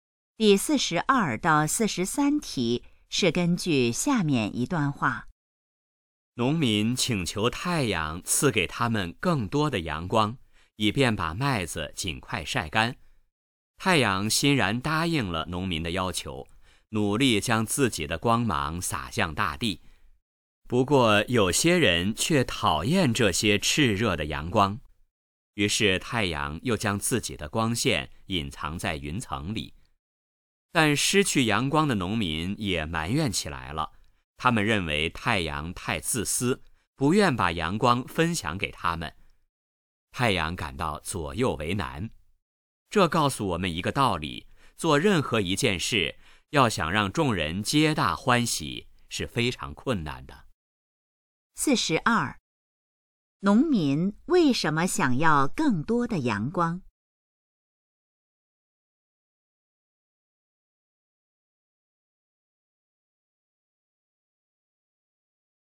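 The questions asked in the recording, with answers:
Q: 农民为什么想要更多的阳光?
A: 为了尽快把麦子晒干

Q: 失去阳光后,农民是什么反应?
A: 埋怨太阳自私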